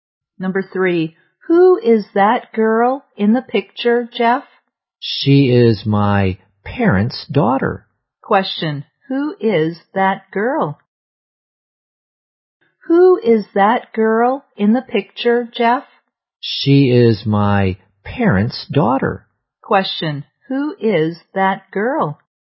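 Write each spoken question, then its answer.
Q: who is that girl?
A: Jeff's sister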